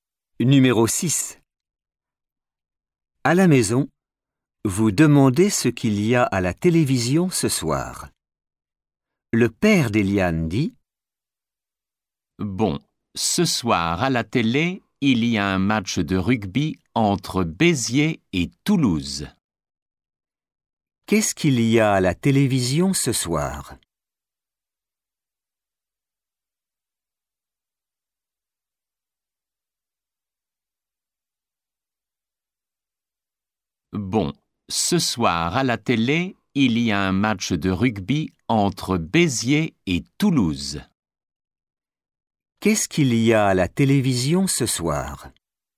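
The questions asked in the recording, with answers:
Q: Qu'est-ce qu'il y a à la télévision ce soir ?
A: Un match de rugby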